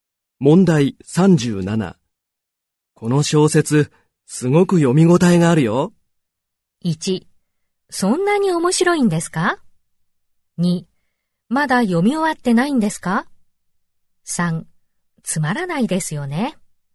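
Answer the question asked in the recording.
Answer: 1: そんなに面白いんですか?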